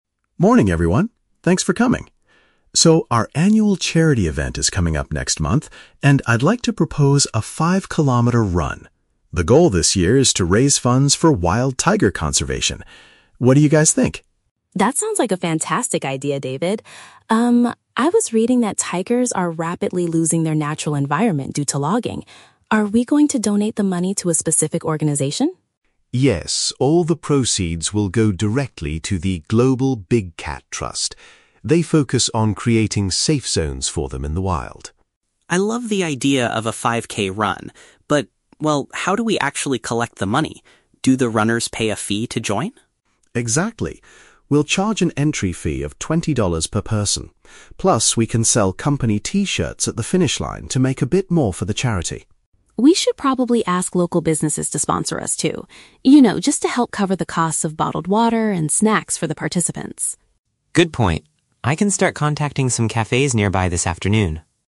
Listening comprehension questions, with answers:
Listen to a meeting between an HR Manager and two employees. Choose the best answer (A, B, or C) for each question.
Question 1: What is the main objective of the upcoming company event?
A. To collect financial support for endangered big cats.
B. To protest against logging companies in the area.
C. To encourage employees to exercise more often.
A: A. To collect financial support for endangered big cats.

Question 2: How will the company primarily gather the donations for the charity?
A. By asking local cafes for direct financial contributions.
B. By requiring participants to pay a registration cost.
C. By selling homemade food at the end of the race.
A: B. By requiring participants to pay a registration cost.

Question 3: What does Brian volunteer to do after the meeting?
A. Design the company T-shirts for the runners.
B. Register the participants before the race begins.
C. Reach out to neighborhood shops for drinks and food.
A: C. Reach out to neighborhood shops for drinks and food.

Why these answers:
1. David says the goal is to "raise funds for wild tiger conservation." Option A uses synonyms: "collect financial support" (raise funds) and "endangered big cats" (wild tigers).
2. David confirms that they will "charge an entry fee of $20 per person." Option B paraphrases this as paying a "registration cost."
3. Brian agrees with Anna's idea to find sponsors for water and snacks and says, "I can start contacting some cafes nearby." Option C paraphrases this as reaching out to "neighborhood shops for drinks and food."

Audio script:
David (HR Manager): Morning, everyone. Thanks for coming. So, our annual charity event is coming up next month, and I'd like to propose a 5-kilometer run. The goal this year is to raise funds for wild tiger conservation. What do you guys think?
Anna: That sounds like a fantastic idea, David. Um, I was reading that tigers are rapidly losing their natural environment due to logging. Are we going to donate the money to a specific organization?
David: Yes, all the proceeds will go directly to the 'Global Big Cat Trust'. They focus on creating safe zones for them in the wild.
Brian: I love the idea of a 5K run. But, well, how do we actually collect the money? Do the runners pay a fee to join?
David: Exactly. We'll charge an entry fee of $20 per person. Plus, we can sell company T-shirts at the finish line to make a bit more for the charity.
Anna: We should probably ask local businesses to sponsor us, too. You know, just to help cover the costs of bottled water and snacks for the participants.

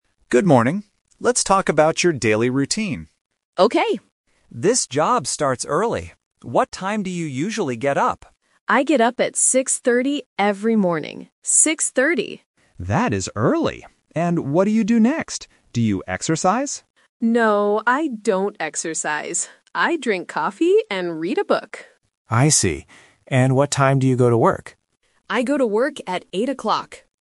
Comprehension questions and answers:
Listen to the conversation and choose the correct answer (A, B, or C).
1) What time does Sarah get up?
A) 6:30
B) 7:00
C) 8:00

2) What does Sarah do after she gets up?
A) She exercises.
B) She drinks coffee.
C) She watches TV.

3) What time does she go to work?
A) 6:30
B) 8:00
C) 9:00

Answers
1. A) 6:30
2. B) She drinks coffee.
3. B) 8:00

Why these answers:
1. The Key: Sarah clearly states, "I get up at 6:30 every morning," and repeats "Six thirty." The Trap (C): 8:00 is mentioned, but it is the time she goes to work, not the time she gets up. (B) is a plausible morning time, but it is not mentioned.
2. The Key: Sarah says, "I drink coffee and read a book." The Trap (A): The interviewer asks, "Do you exercise?" but Sarah says, "No, I don't exercise." (C) is a plausible morning activity, but it is not mentioned.
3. The Key: Sarah answers the interviewer directly: "I go to work at 8:00." The Trap (A): 6:30 is mentioned, but it is the time she gets up. (C) is a plausible work start time, but it is not mentioned.

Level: A1

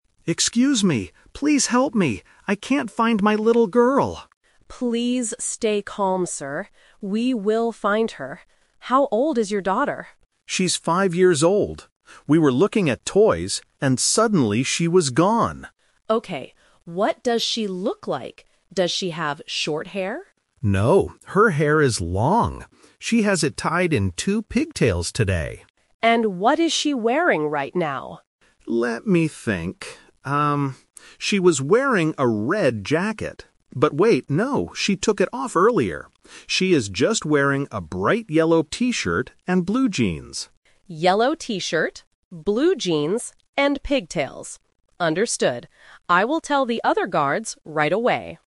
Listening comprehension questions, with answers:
Listen to the conversation and choose the correct answer (A, B, or C).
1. What does the little girl's hair look like?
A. It is short and curly.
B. It is long with two pigtails.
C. It is short and straight.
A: B. It is long with two pigtails.

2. What is the little girl wearing on her top?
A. A bright yellow T-shirt.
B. A red jacket.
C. A blue sweater.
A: A. A bright yellow T-shirt.

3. What will the security guard do next?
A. Call the police station.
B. Look for the toy store.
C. Tell the other security guards.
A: C. Tell the other security guards.

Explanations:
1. The dad explicitly says, "her hair is long. She has it tied in two pigtails today."
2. The dad corrects himself and says, "She is just wearing a bright yellow T-shirt..."
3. At the end of the conversation, the guard says, "I will tell the other guards right away."

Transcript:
Dad: Excuse me! Please help me. I can't find my little girl!
Security Guard: Please stay calm, sir. We will find her. How old is your daughter?
Dad: She's five years old. We were looking at toys, and suddenly she was gone.
Security Guard: Okay. What does she look like? Does she have short hair?
Dad: No, her hair is long. She has it tied in two pigtails today.
Security Guard: And what is she wearing right now?
Dad: Let me think... um, she was wearing a red jacket. But wait, no, she took it off earlier. She is just wearing a bright yellow T-shirt and blue jeans.
Security Guard: Yellow T-shirt, blue jeans, and pigtails. Understood. I will tell the other guards right away.

